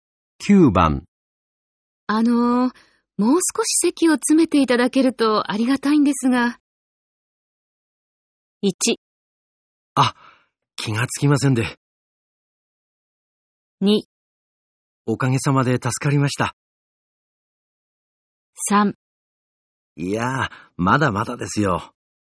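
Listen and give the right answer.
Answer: 1: あ、気がつきませんで。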